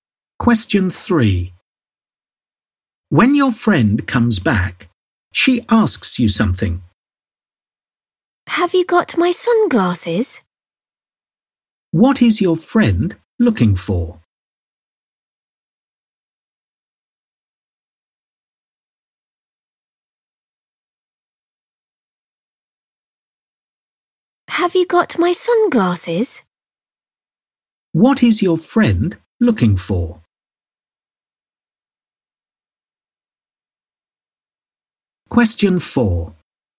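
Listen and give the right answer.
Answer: Her sunglasses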